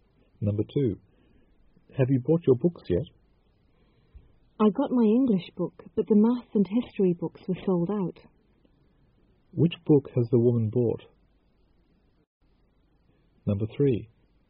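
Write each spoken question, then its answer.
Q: Which book has the woman bought?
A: Her English book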